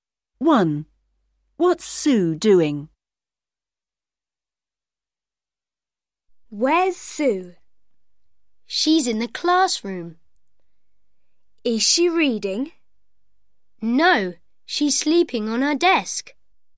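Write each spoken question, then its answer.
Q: What's Sue doing?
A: Sleeping on her desk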